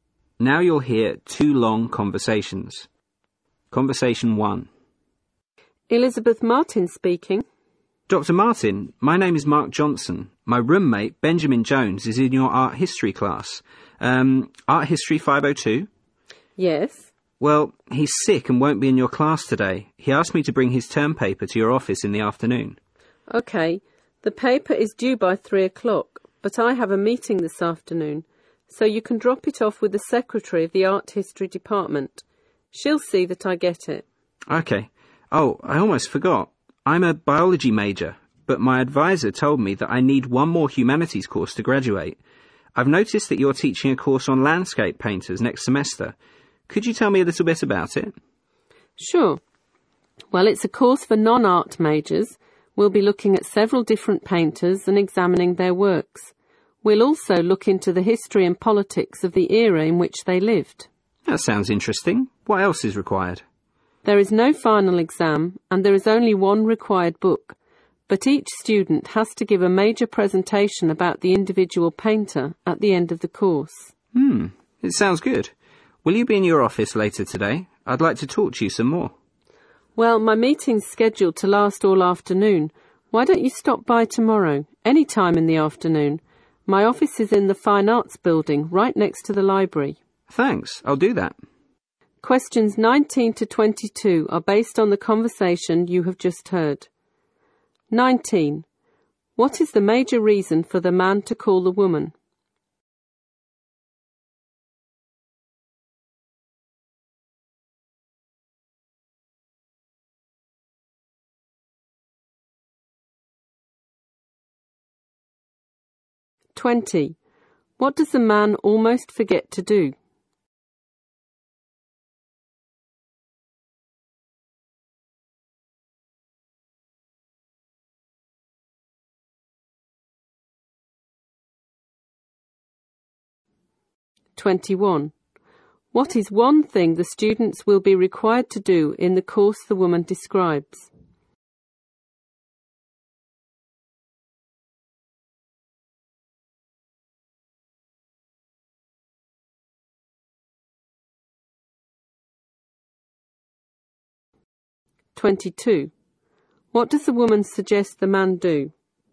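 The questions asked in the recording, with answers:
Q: What is the major reason for the man to call the woman?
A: To tell her his roommate is sick and he'll bring the roommate's term paper

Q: What does the man almost forget to do?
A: Ask about her landscape painters course

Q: What is one thing the students will be required to do in the course the woman describes?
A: Give a major presentation about an individual painter

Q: What does the woman suggest the man do?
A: Stop by her office tomorrow afternoon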